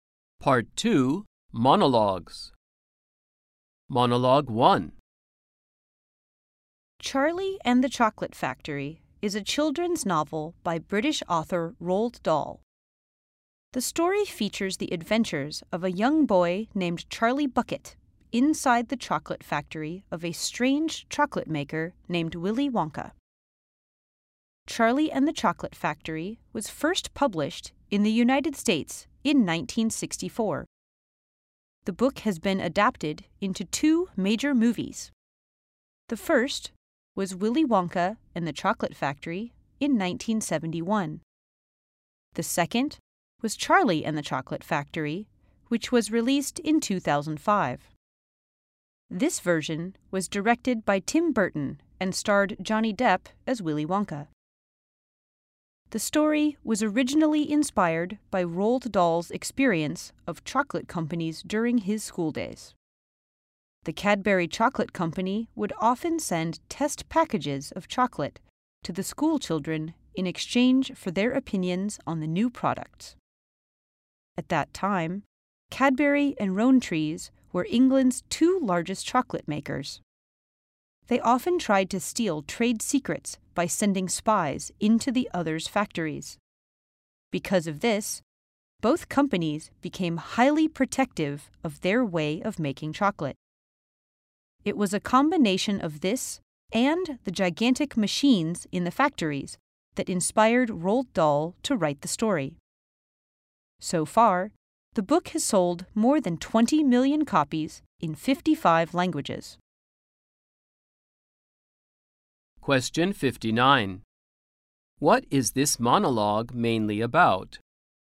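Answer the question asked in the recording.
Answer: The book Charlie and the Chocolate Factory and how it came to be written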